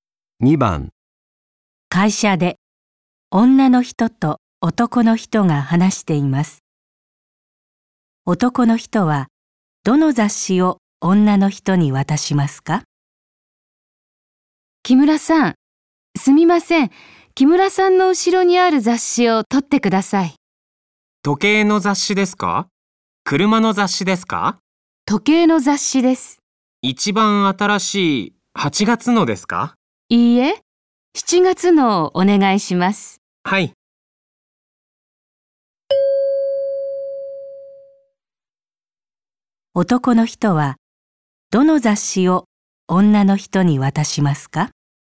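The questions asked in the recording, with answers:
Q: 男の人はどの雑誌を女の人に渡しますか?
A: 7月の時計の雑誌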